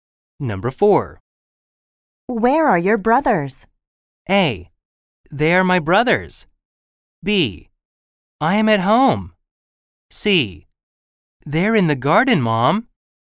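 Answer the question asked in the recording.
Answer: C: They're in the garden, Mom.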